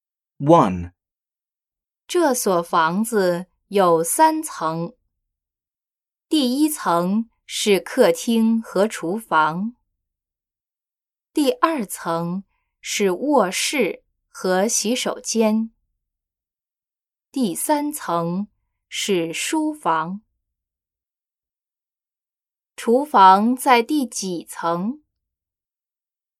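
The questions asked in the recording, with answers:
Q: 厨房在第几层?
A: 第一层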